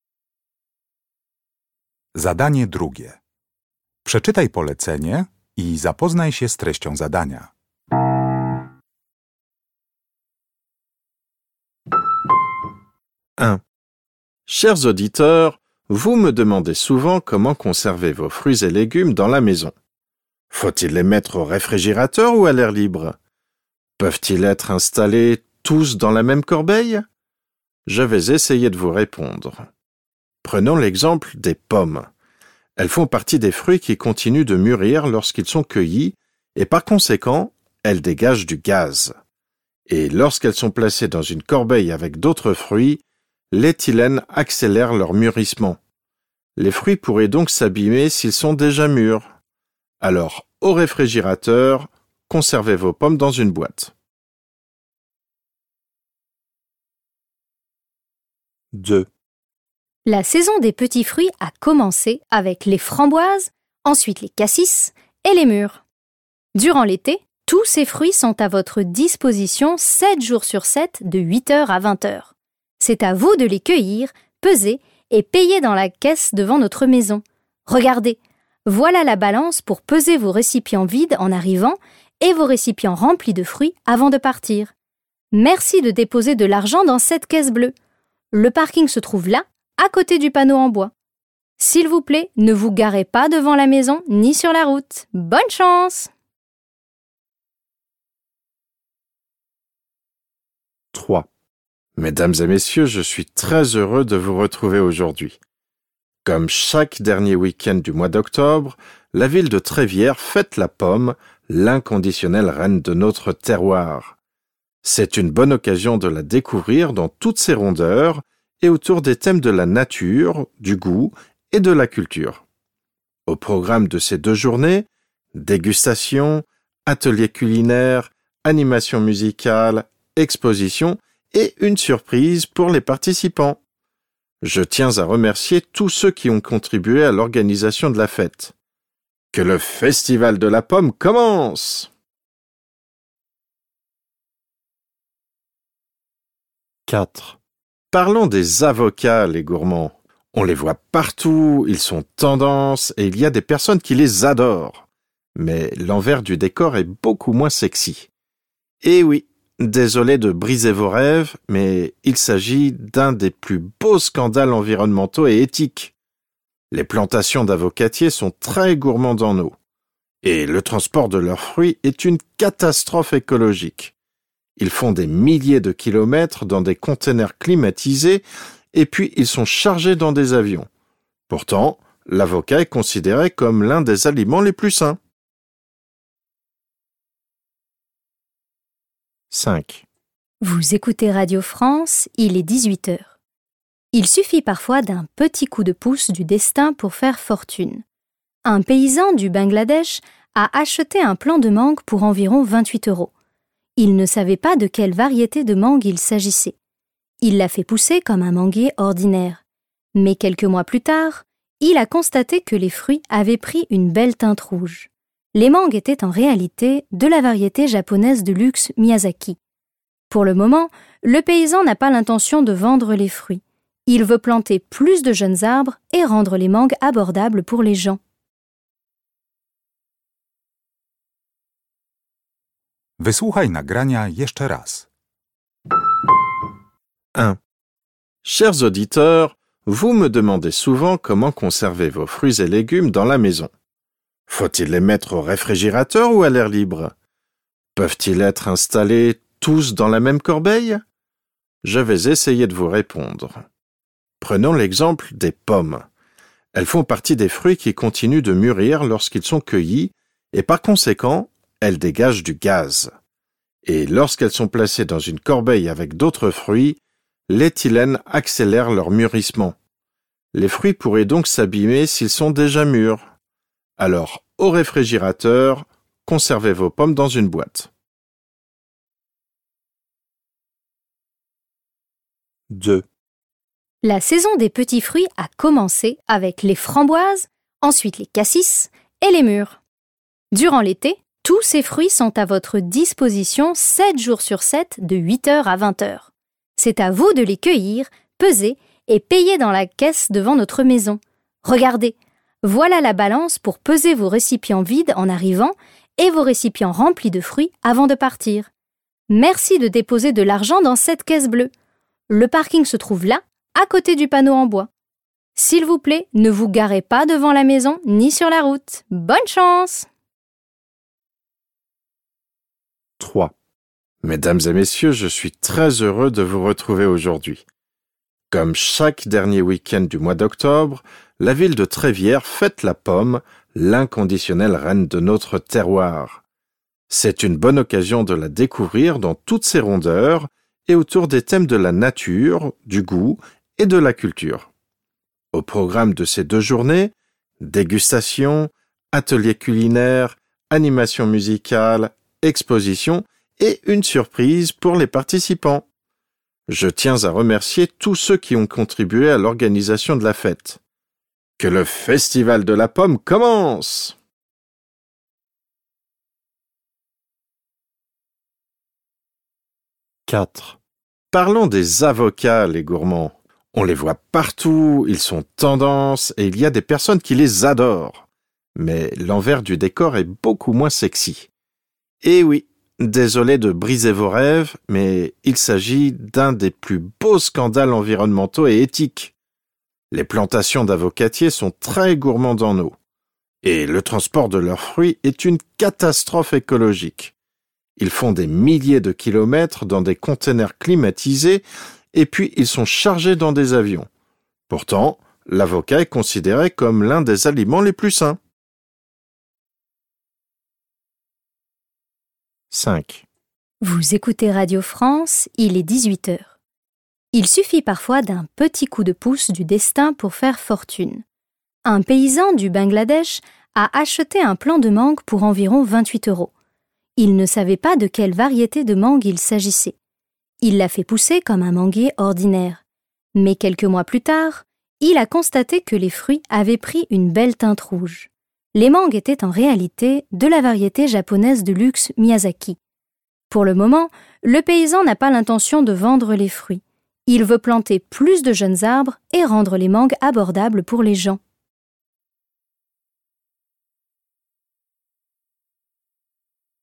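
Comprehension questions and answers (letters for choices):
Uruchamiając odtwarzacz z oryginalnym nagraniem CKE usłyszysz dwukrotnie pięć wypowiedzi na temat owoców. Do każdej wypowiedzi (2.1.–2.5.) dopasuj odpowiadające jej zdanie (A–F).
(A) Ce fruit possède un statut unique.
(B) Ce fruit a causé une surprise agréable.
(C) Ce fruit est à l'origine d'un grand paradoxe.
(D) Il faudra faire soi-même la récolte des fruits.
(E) On devrait consommer beaucoup plus de fruits.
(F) Ce fruit peut avoir une influence néfaste sur d'autres fruits.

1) 2.1.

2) 2.2.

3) 2.3.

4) 2.4.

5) 2.5.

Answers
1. F
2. D
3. A
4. C
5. B

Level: Poziom: rozszerzony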